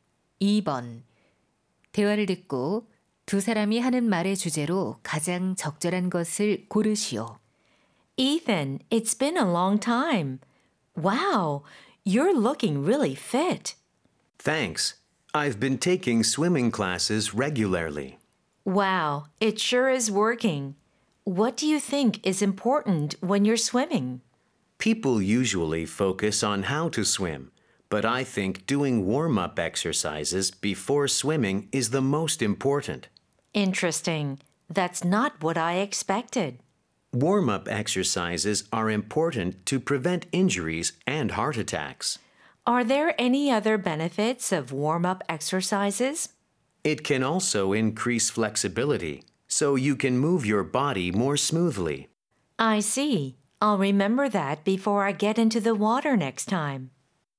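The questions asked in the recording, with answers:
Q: 대화를 듣고 두 사람이 하는 말의 주제로 가장 적절한 것을 고르시오.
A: 수영 전 준비 운동의 중요성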